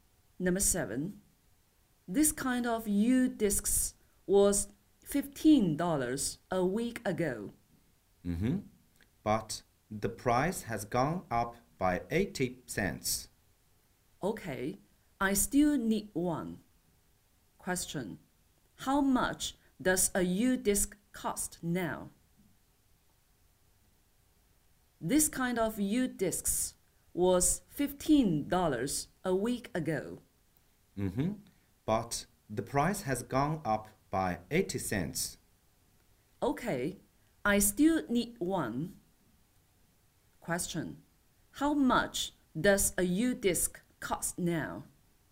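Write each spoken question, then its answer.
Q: How much does a U-disc cost now?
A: $15.80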